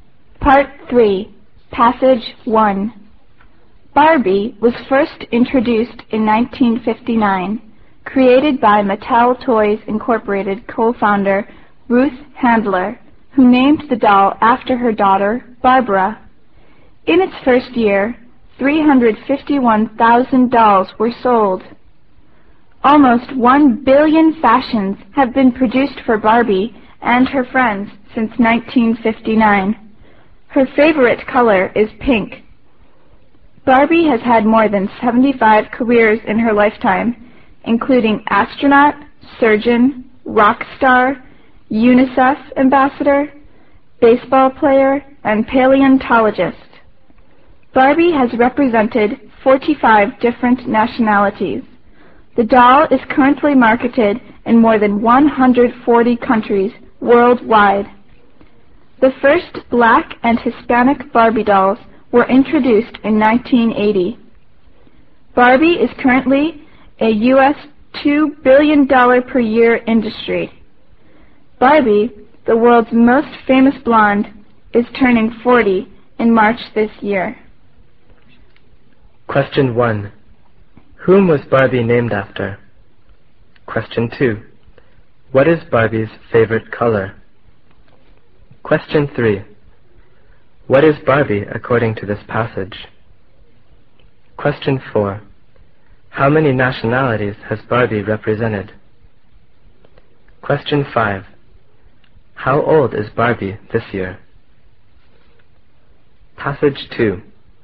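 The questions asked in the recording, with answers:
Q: Whom was Barbie named after?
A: Ruth Handler's daughter, Barbara

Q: What is Barbie's favorite color?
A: Pink

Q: How many nationalities has Barbie represented?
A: 45

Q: How old is Barbie this year?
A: 40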